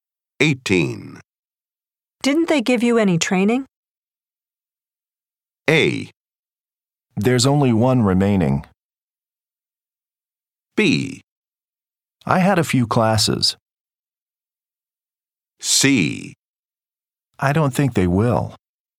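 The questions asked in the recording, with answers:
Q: Didn't they give you any training?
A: B: I had a few classes.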